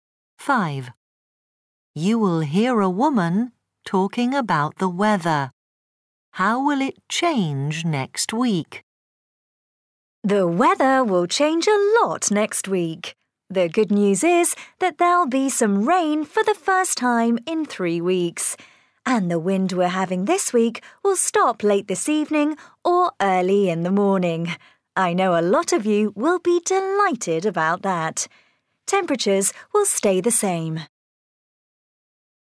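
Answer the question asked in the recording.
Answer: It will rain and the wind will stop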